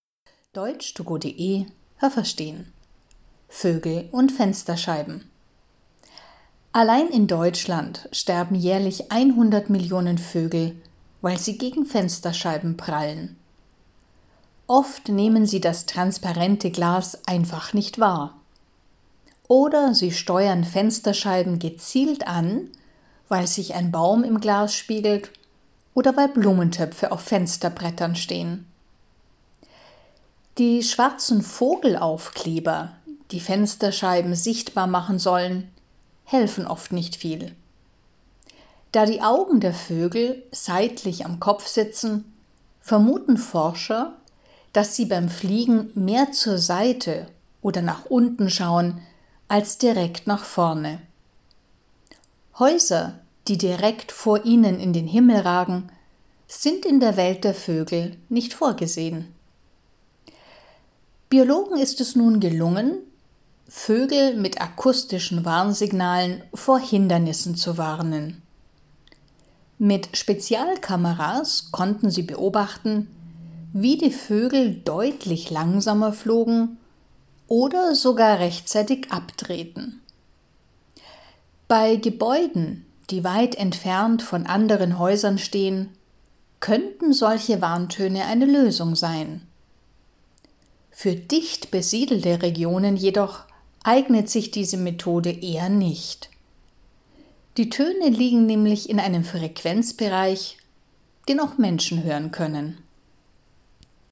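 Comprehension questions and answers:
Haben Sie das gehört? Stimmt diese Aussage?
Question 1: Weltweit sterben im Jahr 100 Millionen Vögel, weil sie gegen Fensterscheiben fliegen.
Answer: Falsch

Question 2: Wenn sich ein Baum in einem Glas spiegelt, dann halten ihn die Vögel für real.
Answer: Richtig

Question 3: Die schwarzen Vogelaufkleber sind sehr hilfreich.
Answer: Falsch

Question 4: Die Vögel können Hindernisse, die direkt vor ihnen auftauchen, gut erkennen.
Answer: Falsch

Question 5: Biologen haben Vögel akustisch vor Hindernissen gewarnt und die Vögel wurden vorsichtiger.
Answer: Richtig

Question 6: Bei Gebäuden, die alleine stehen, und in dicht besiedelten Regionen sind solche akustischen Signale eine gute Lösung, um Vögel zu warnen.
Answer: Falsch

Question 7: In dicht besiedelten Regionen sind die Warntöne keine gute Lösung, weil auch Menschen diese Töne gut hören können.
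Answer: Richtig

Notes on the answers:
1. So viele Vögel sterben in einem Jahr in Deutschland.
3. Sie helfen nicht viel.
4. Die Augen der Vögel sind seitlich am Kopf. Forscher vermuten deshalb, dass sie beim Fliegen eher zur Seite oder nach unten schauen.
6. Das ist nur eine gute Lösung für Gebäude, die weit entfernt von anderen Häusern stehen.

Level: B2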